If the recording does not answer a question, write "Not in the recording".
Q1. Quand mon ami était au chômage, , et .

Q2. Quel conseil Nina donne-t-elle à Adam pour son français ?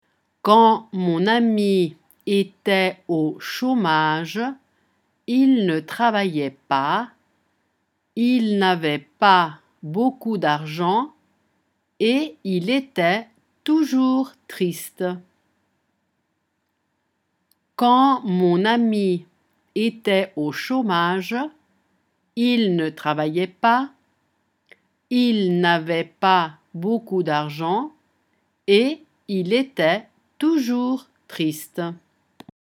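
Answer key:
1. il ne travaillait pas / il n'avait pas beaucoup d'argent / il était toujours triste
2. Not in the recording

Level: A2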